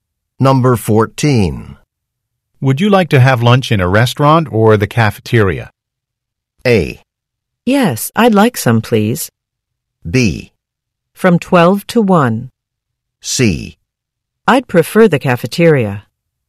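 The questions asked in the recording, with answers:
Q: Would you like to have lunch in a restaurant or the cafeteria?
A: C: I'd prefer the cafeteria.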